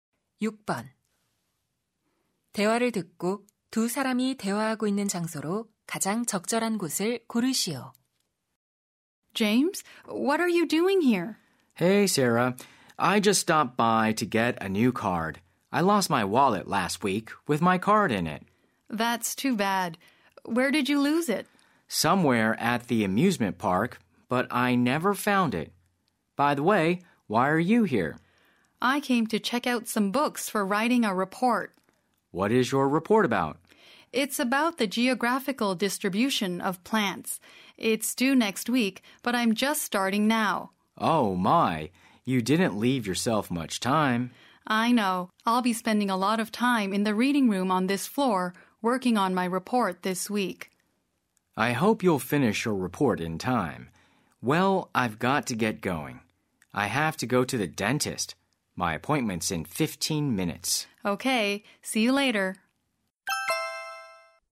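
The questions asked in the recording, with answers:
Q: 대화를 듣고 두 사람이 대화하고 있는 장소로 가장 적절한 곳을 고르시오.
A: 도서관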